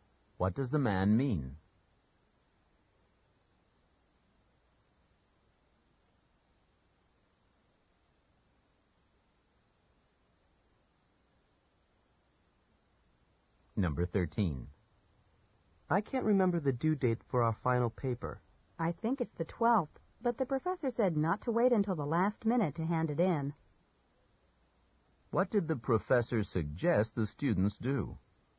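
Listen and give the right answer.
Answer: Hand in the paper early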